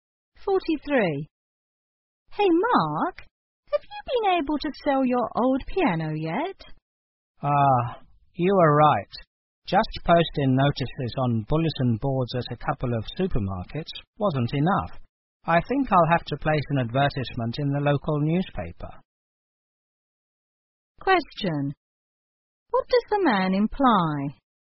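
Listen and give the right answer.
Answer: He hasn't sold the piano yet.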